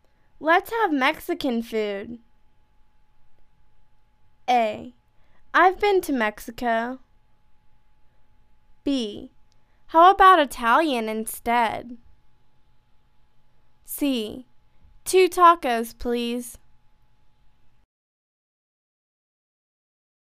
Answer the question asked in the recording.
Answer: How about Italian instead?